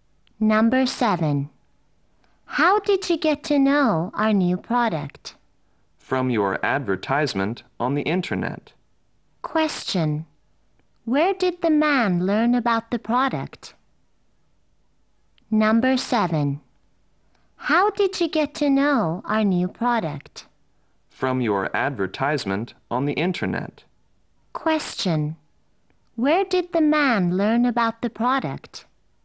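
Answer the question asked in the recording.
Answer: From the advertisement on the internet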